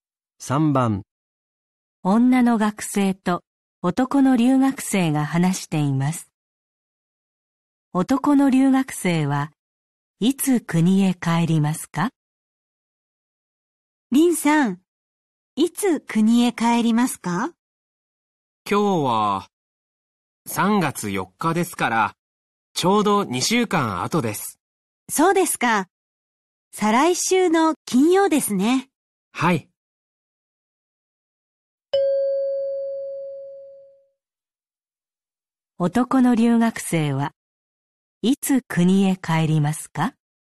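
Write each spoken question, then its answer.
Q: 男の留学生はいつ国へ帰りますか?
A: 再来週の金曜日(3月18日)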